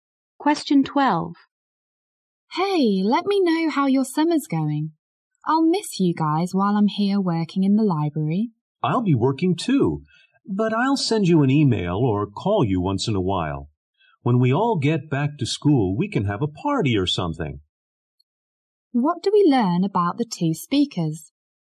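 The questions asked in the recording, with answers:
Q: What do we learn about the 2 speakers?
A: Both will be working during the summer and will keep in touch.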